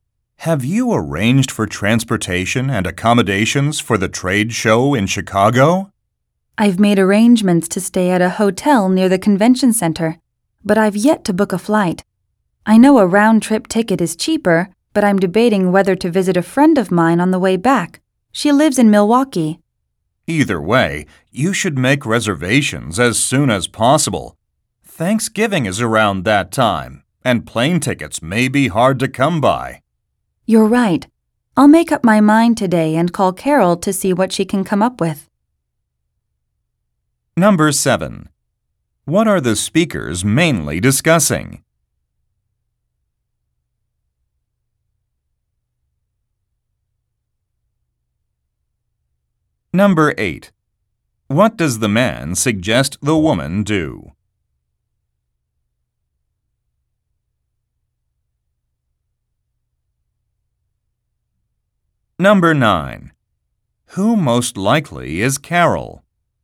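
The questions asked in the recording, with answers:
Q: What are the speakers mainly discussing?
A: Travel arrangements for a trade show in Chicago

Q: What does the man suggest the woman do?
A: Make reservations as soon as possible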